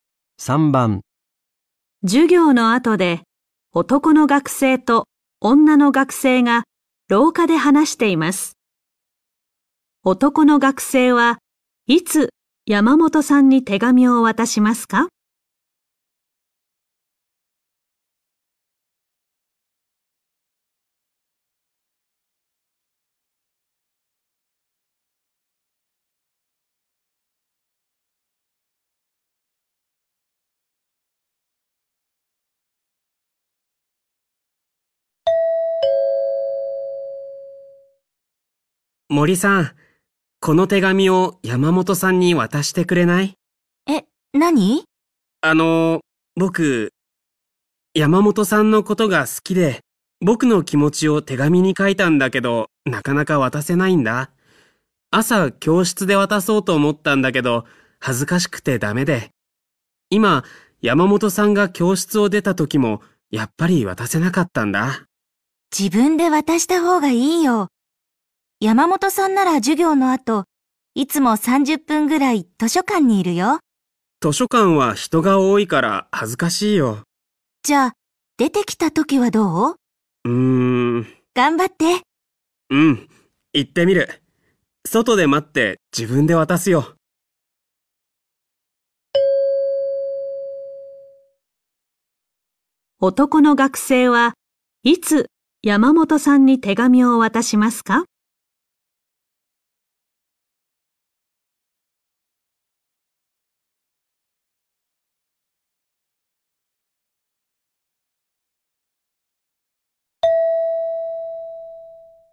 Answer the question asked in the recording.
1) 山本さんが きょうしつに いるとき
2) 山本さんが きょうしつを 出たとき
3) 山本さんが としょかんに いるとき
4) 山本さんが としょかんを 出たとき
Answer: 4) 山本さんが としょかんを 出たとき

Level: N4 Listening · Test 1